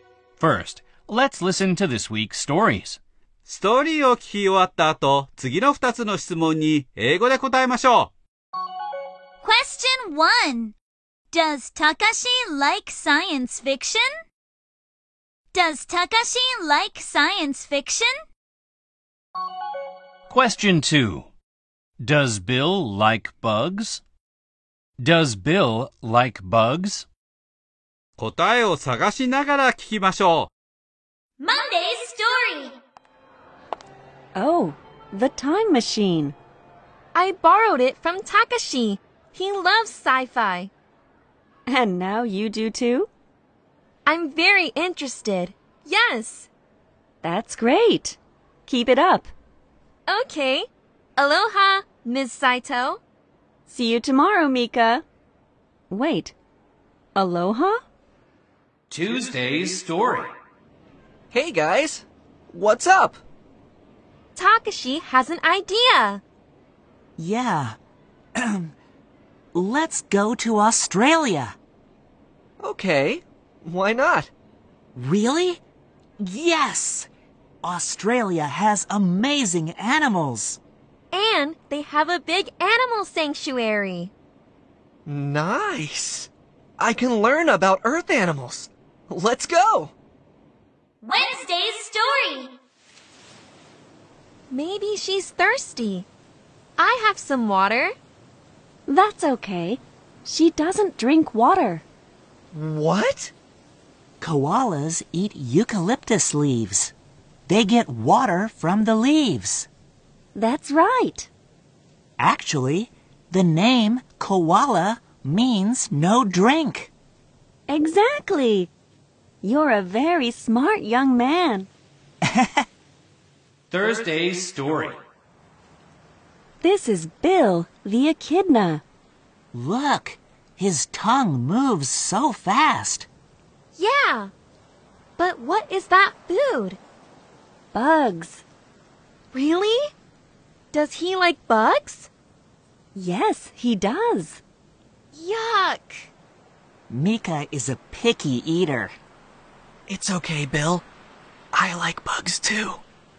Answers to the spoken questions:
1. Yes, he does.
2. Yes, he does.